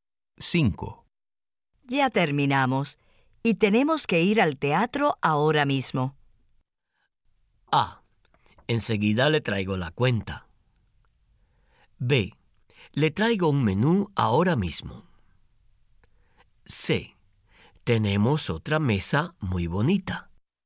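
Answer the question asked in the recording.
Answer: A: Enseguida le traigo la cuenta.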